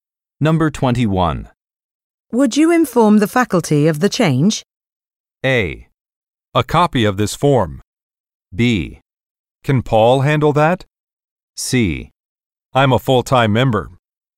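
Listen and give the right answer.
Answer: B: Can Paul handle that?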